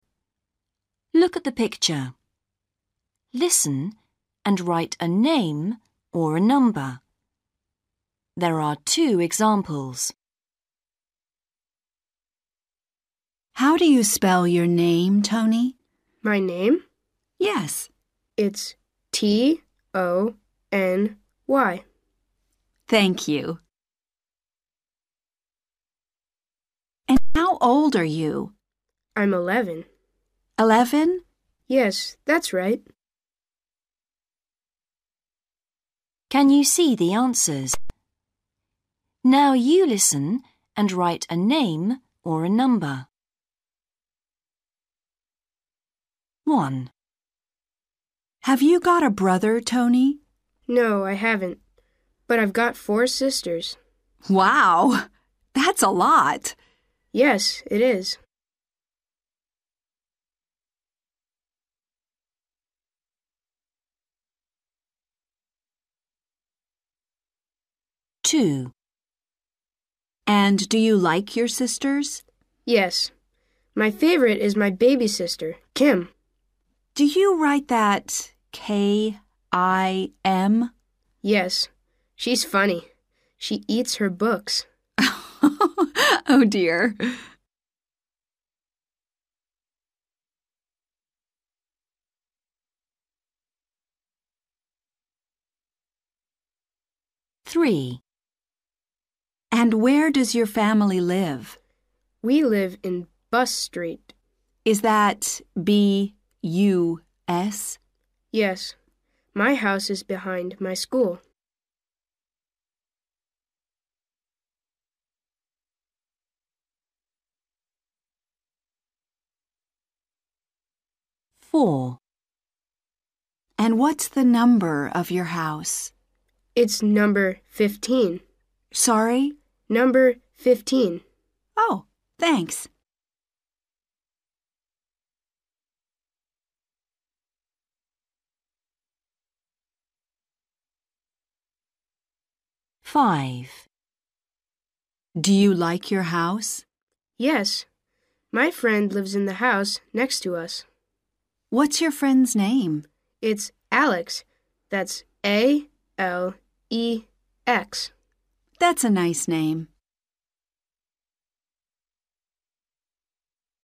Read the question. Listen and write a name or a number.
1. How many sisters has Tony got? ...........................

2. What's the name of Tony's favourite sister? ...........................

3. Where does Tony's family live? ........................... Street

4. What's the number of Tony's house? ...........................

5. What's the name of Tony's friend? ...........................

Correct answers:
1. 4/four
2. Kim
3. Bus
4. 15/fifteen
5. Alex

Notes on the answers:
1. BOY: No, I haven't, but I've got four sisters.
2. BOY: Yes. My favourite is my baby sister, Kim.
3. BOY: We live in Bus Street.
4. BOY: It's number fifteen.
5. BOY: It's Alex. That's A-L-E-X.

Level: Starters